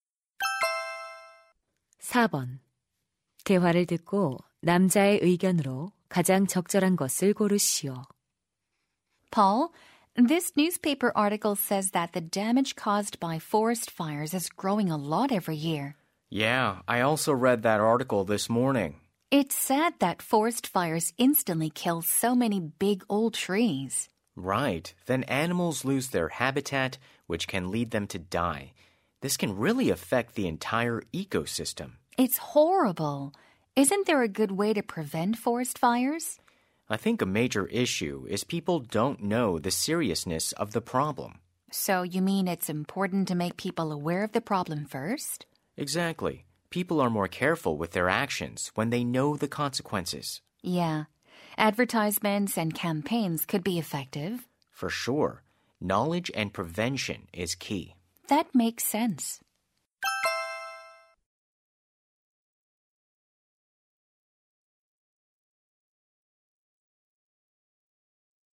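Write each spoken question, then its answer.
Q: 대화를 듣고 남자의 의견으로 가장 적절한 것을 고르시오.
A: 산불 예방을 위해 사람들에게 문제의 심각성을 알려야 한다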